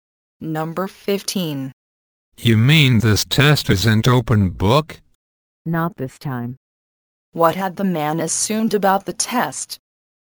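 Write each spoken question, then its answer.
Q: What had the man assumed about the test?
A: That it was an open-book test.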